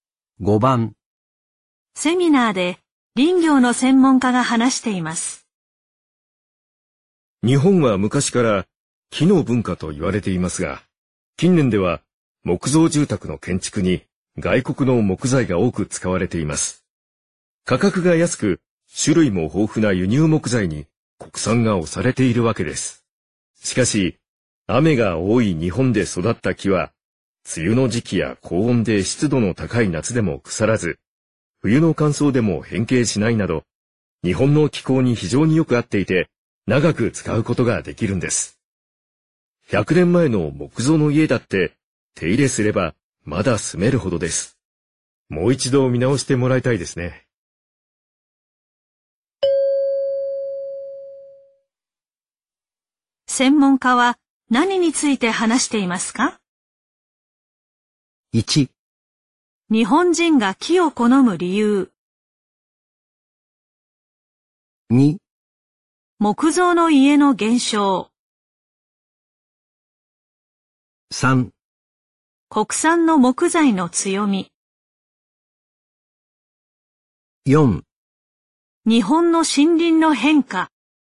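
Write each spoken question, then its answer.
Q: 専門家は何について話していますか?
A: 3: 国産の木材の強み。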